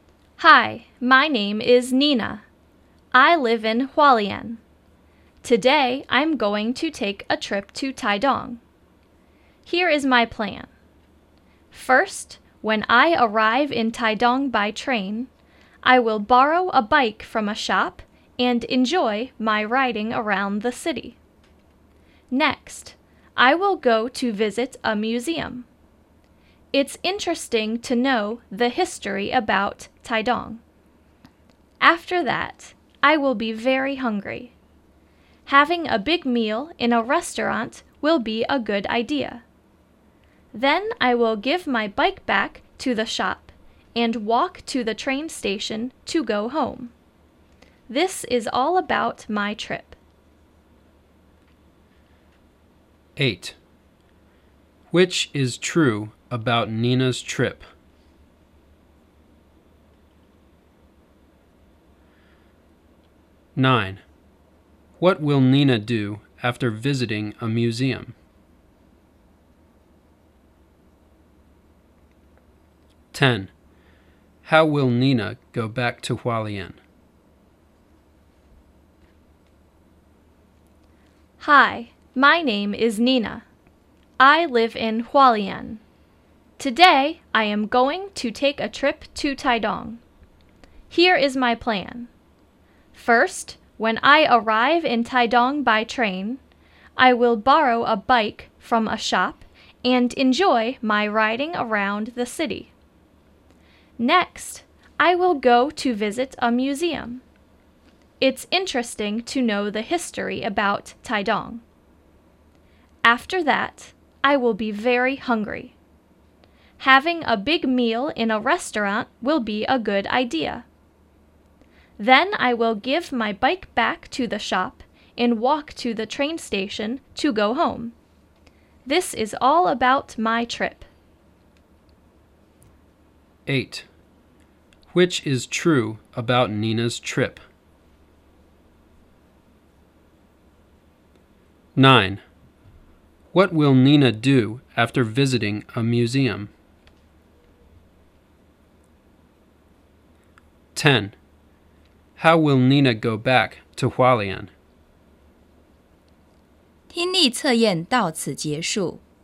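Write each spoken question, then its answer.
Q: What will Nina do after visiting a museum?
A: Have a big meal in a restaurant

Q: How will Nina go back to Hualien?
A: By train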